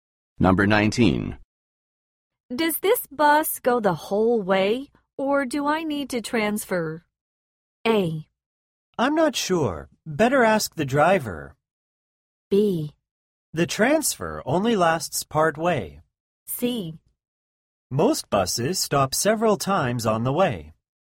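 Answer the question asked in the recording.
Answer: A: I'm not sure. Better ask the driver.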